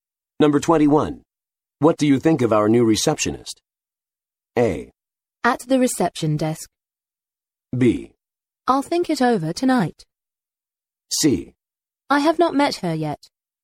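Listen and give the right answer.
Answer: C: I have not met her yet.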